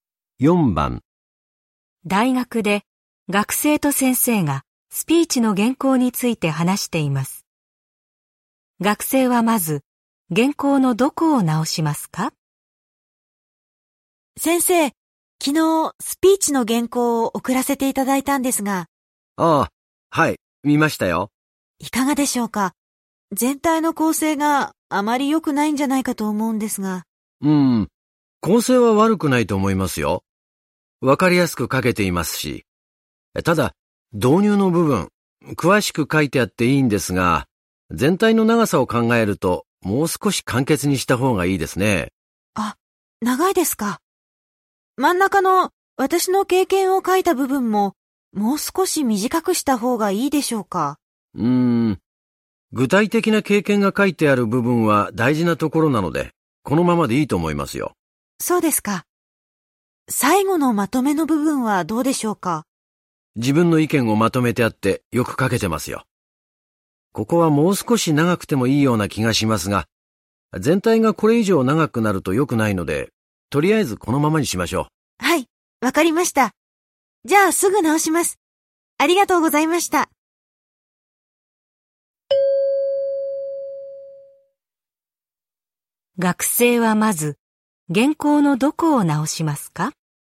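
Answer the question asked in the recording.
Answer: 導入の部分を短くする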